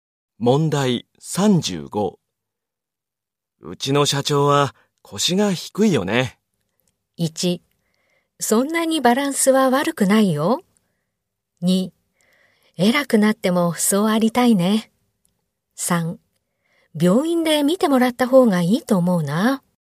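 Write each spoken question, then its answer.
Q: うちの社長は腰が低いよね。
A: 2: 偉くなってもそうありたいね。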